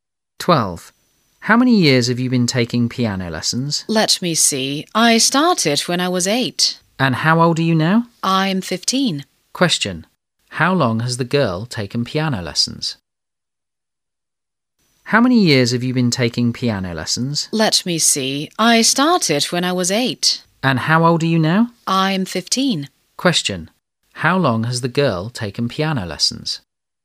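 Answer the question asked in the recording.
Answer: For 7 years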